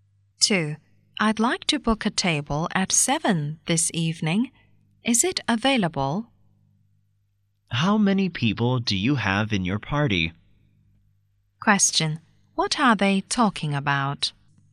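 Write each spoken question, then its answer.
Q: What are they talking about?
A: Booking a table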